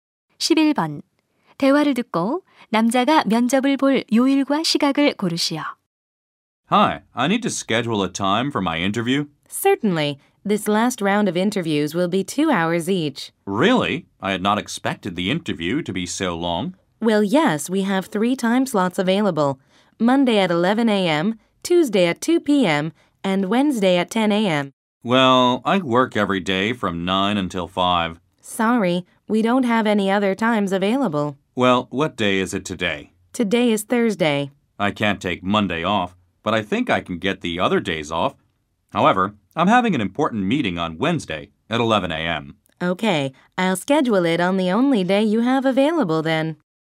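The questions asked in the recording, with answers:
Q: 대화를 듣고 남자가 면접을 볼 요일과 시각을 고르시오.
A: 화요일 오후 2시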